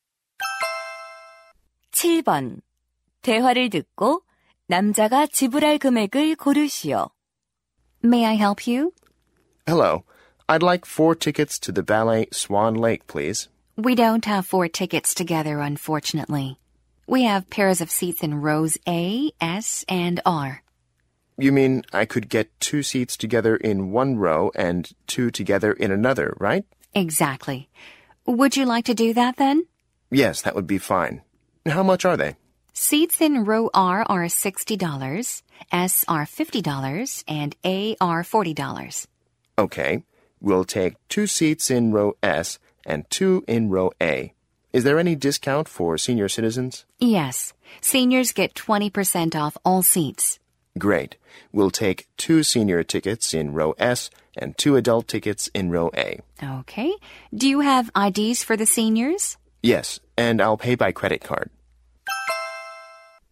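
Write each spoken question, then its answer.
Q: 대화를 듣고 남자가 지불할 금액을 고르시오.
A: 160달러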